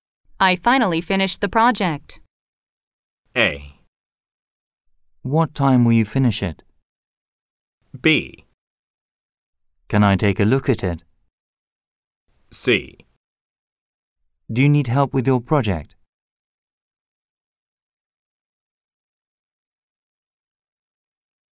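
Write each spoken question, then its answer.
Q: I finally finished the project.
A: B: Can I take a look at it?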